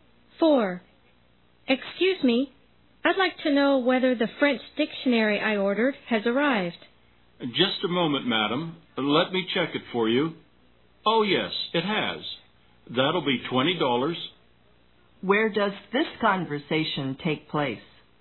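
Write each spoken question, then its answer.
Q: Where does this conversation take place?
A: At a bookstore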